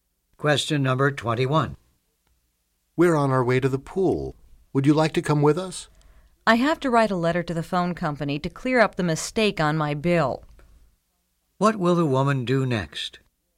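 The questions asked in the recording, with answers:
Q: What will the woman do next?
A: Write a letter to the phone company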